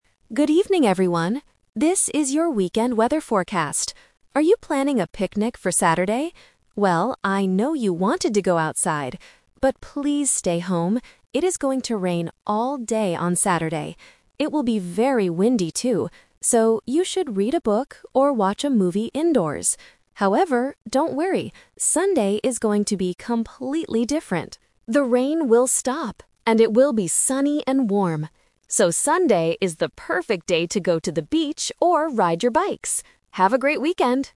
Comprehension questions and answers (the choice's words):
Listen to the weather forecast and choose the correct answer (A, B, or C) for each question.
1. What will the weather be like on Saturday?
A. Sunny and warm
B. Rainy and windy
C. Snowy and cold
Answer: Rainy and windy

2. What does the presenter tell people to do on Saturday?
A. Go for a picnic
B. Stay indoors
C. Go shopping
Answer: Stay indoors

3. When is the best time to go to the beach?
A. On Friday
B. On Saturday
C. On Sunday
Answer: On Sunday

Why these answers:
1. The presenter clearly states that on Saturday, "It is going to rain all day" and it will be "very windy." Option A (sunny and warm) is a trap because that is the weather for Sunday. Option C (snowy) is not mentioned in the audio.
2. The presenter asks if you are planning a picnic (The Trap), but tells you to "stay home" and "watch a movie indoors" because of the rain. Option C (go shopping) is a plausible weekend activity but is never mentioned.
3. The presenter says that the weather will change on Sunday. Because it will be sunny, "Sunday is the perfect day to go to the beach." Option B (Saturday) is a trap because people must stay inside on that day. Option A (Friday) is not mentioned.

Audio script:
TV Presenter: Good evening, everyone. This is your weekend weather forecast. Are you planning a picnic for Saturday? Well, I know you wanted to go outside. But, please stay home. It is going to rain all day on Saturday. It will be very windy, too. So, you should read a book or watch a movie indoors.
However, don't worry! Sunday is going to be completely different. The rain will stop, and it will be sunny and warm. So, Sunday is the perfect day to go to the beach or ride your bikes. Have a great weekend!

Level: A2